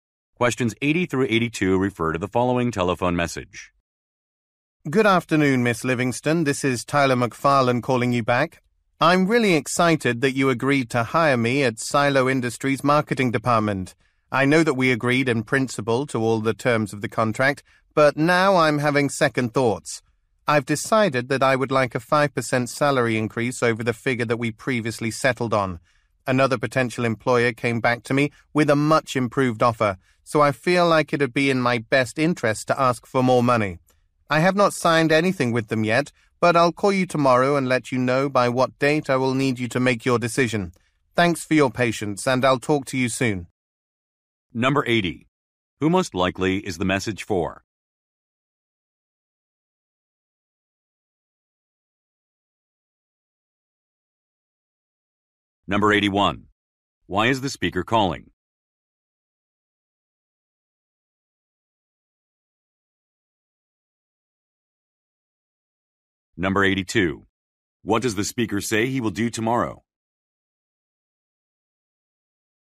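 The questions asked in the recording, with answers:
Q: Who most likely is the message for?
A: A hiring manager at Silo Industries

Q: Why is the speaker calling?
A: To ask for a higher salary

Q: What does the speaker say he will do tomorrow?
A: Call with a deadline for her decision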